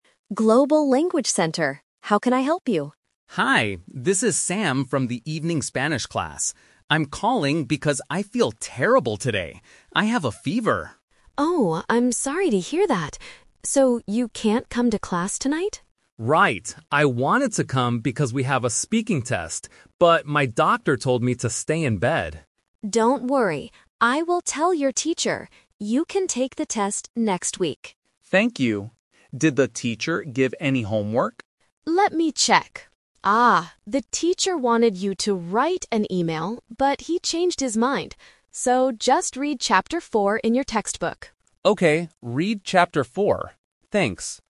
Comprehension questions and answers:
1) Why is Sam absent from class tonight?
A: His doctor told him to stay in bed.

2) When will Sam take his speaking test?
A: Next week.

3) What is the homework for the class?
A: Reading a chapter.

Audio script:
Mary: Global Language Center. How can I help you?
Sam: Hi, this is Sam from the evening Spanish class. I'm calling because I feel terrible today. I have a fever.
Mary: Oh, I'm sorry to hear that. So you can't come to class tonight?
Sam: Right. I wanted to come because we have a speaking test, but my doctor told me to stay in bed.
Mary: Don't worry. I will tell your teacher. You can take the test next week.
Sam: Thank you. Did the teacher give any homework?
Mary: Let me check. Ah, the teacher wanted you to write an email, but he changed his mind. So, just read chapter four in your textbook.